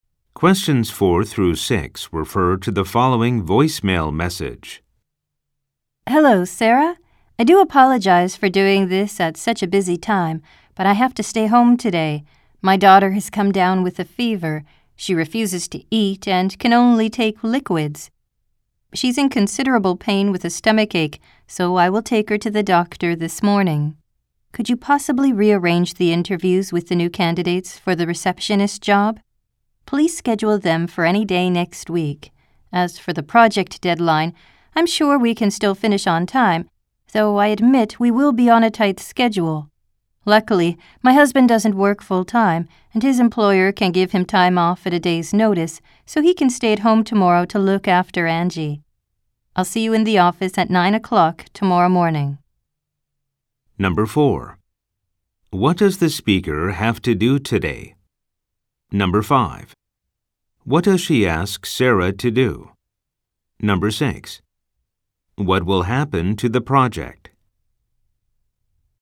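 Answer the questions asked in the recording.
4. Stay home and take her sick daughter to the doctor
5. Reschedule the receptionist candidate interviews for next week
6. It will still finish on time, on a tight schedule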